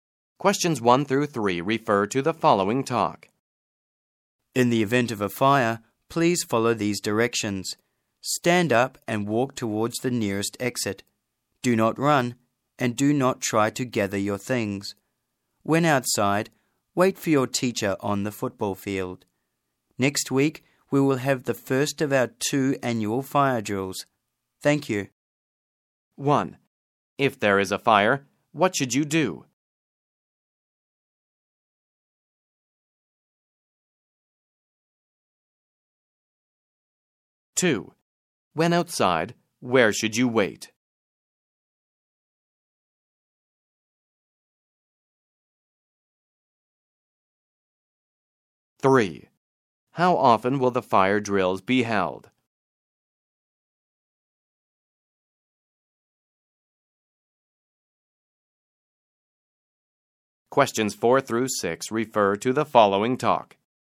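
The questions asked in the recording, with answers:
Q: If there is a fire, what should you do?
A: Stand up and walk towards the nearest exit

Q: When outside, where should you wait?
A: On the football field

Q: How often will the fire drills be held?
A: Twice a year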